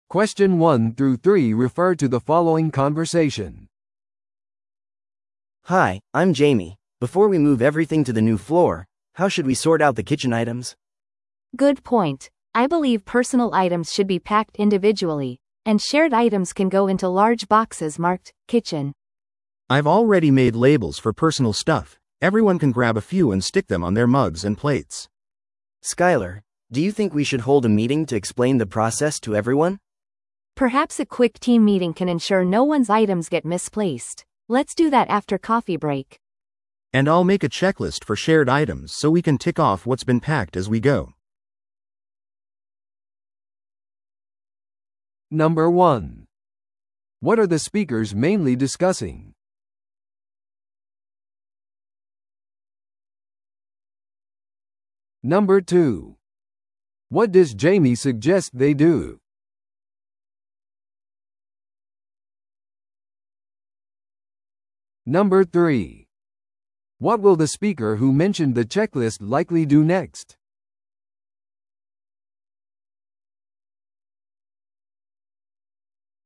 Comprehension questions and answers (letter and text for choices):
Listen to the audio below and answer the questions.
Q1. What are the speakers mainly discussing?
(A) オフィス会議の組織。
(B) 個々の作業スペースのラベル付け。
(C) 個人と共有のキッチン用品の整理。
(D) 新しいオフィスフロアの改装。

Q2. What does Jamie suggest they do?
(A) すべてのキッチン用品を一緒に梱包する。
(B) ソートプロセスを説明する会議を開く。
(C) プロの引越し会社に電話をする。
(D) 新しいキッチン用具を購入する。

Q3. What will the speaker who mentioned the checklist likely do next?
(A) 自分の個人的なアイテムの梱包を開始する。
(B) 共有アイテムのチェックリストを作成する。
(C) 新しいフロアレイアウトのラベルを作成する。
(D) チームのためのコーヒーブレークを組織する。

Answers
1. (C) 個人と共有のキッチン用品の整理。
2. (B) ソートプロセスを説明する会議を開く。
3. (B) 共有アイテムのチェックリストを作成する。

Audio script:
Before we move everything to the new floor, how should we sort out the kitchen items?
B: Good point. I believe personal items should be packed individually, and shared items can go into large boxes marked 'kitchen'.
C: I've already made labels for personal stuff. Everyone can grab a few and stick them on their mugs and plates.
A: Skyler, do you think we should hold a meeting to explain the process to everyone?
B: Perhaps a quick team meeting can ensure no one's items get misplaced. Let's do that after coffee break.
C: And I'll make a checklist for shared items so we can tick off what's been packed as we go.